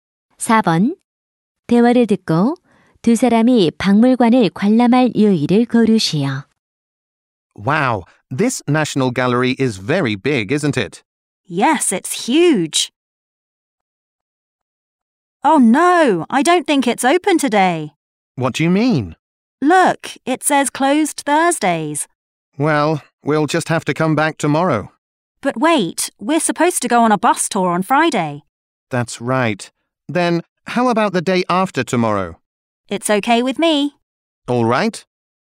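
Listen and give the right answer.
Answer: 토요일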